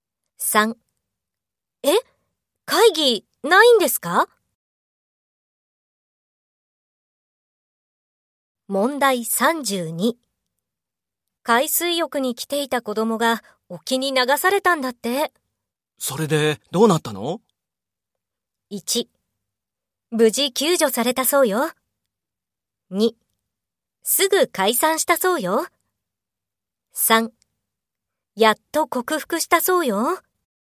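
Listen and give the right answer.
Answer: 1: 無事救助されたそうよ。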